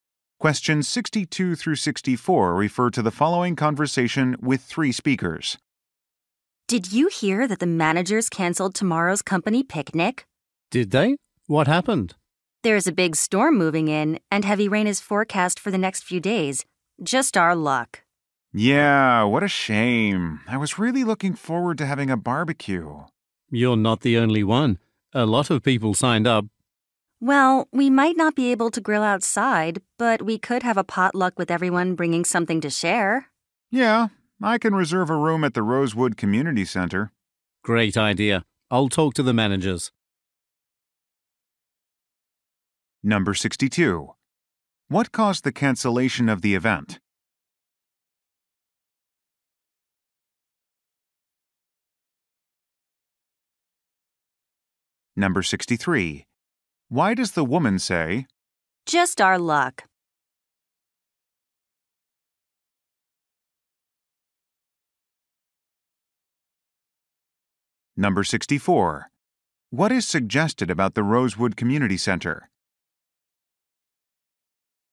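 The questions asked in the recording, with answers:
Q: What caused the cancellation of the event?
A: Bad weather (a storm).

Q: Why does the woman say,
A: She is disappointed about the bad timing.

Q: What is suggested about the Rosewood Community Center?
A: It has rooms that can be reserved for events.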